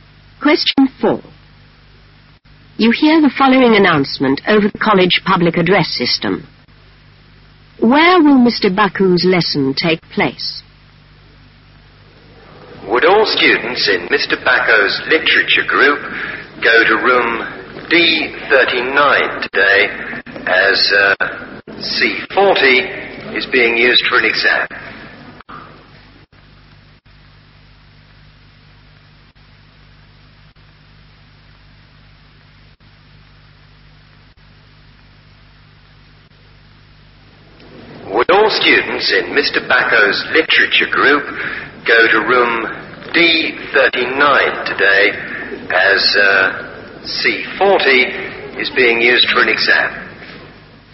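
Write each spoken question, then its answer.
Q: Where will Mr. Baku's lesson take place?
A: Room D39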